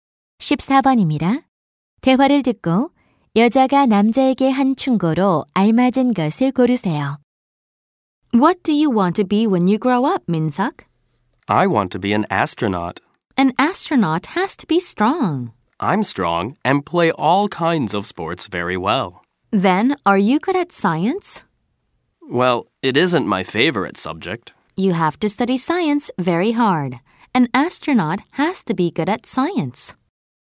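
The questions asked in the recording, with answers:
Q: 대화를 듣고 여자가 남자에게 한 충고로 알맞은 것을 고르세요.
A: 과학을 열심히 공부하라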